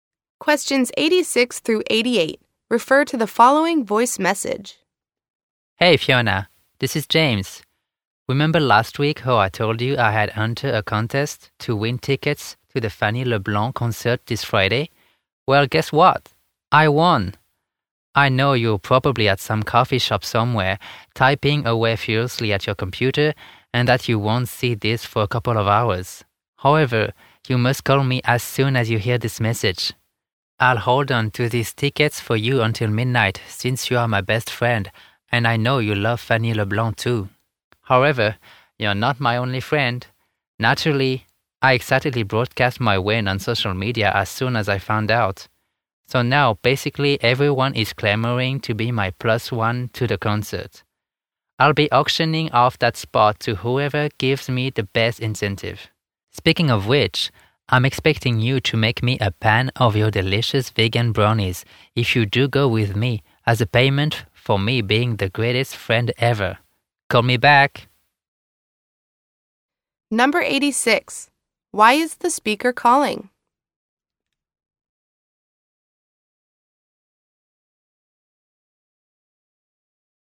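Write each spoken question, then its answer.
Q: Why is the speaker calling?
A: He won concert tickets and wants Fiona to call him back if she wants to go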